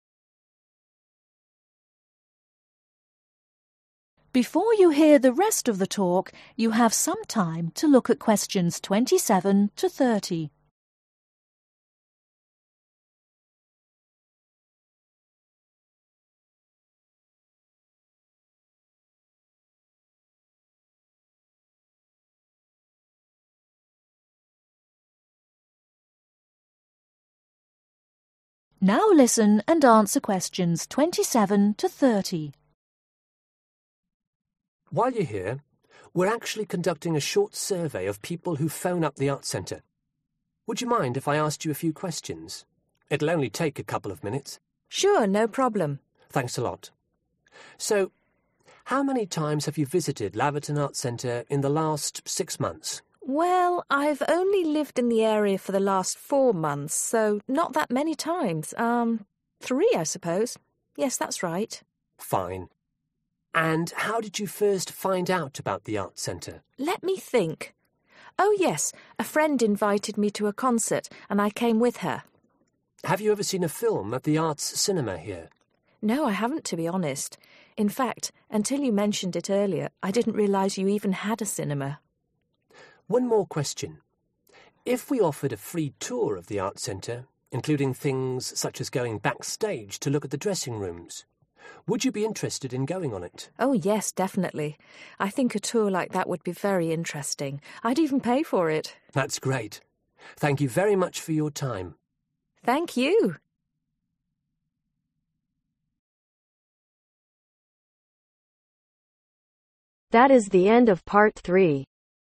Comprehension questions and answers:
Complete the sentences below. Write ONE WORD/OR A NUMBER for each answer.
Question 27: the woman has visited the Arts Centre ............ times in total.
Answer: 3

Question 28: The first event at the Arts Centre the woman went to was a ............ .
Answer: Concert

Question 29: The woman was unaware there was a ............ at the Arts Centre.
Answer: Cinema

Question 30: The woman likes the idea of a ............ .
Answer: Tour